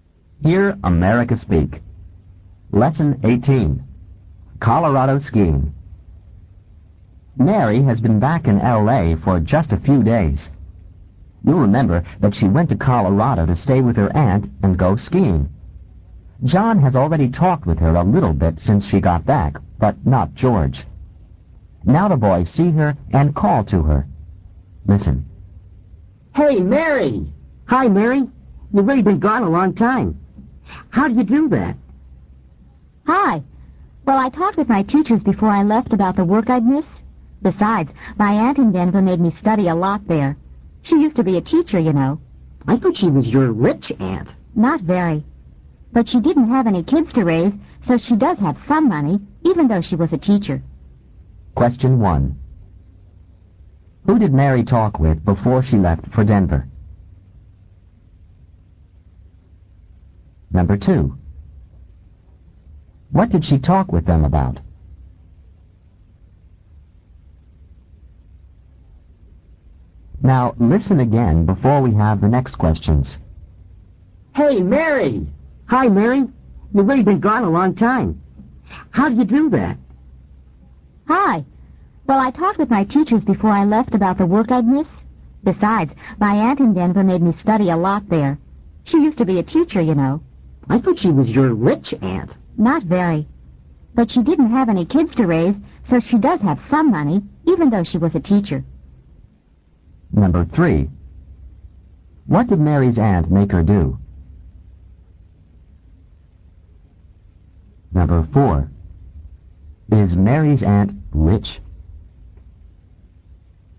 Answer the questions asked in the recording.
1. Her teachers.
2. About the work she'd miss.
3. She made her study a lot.
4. No, not very.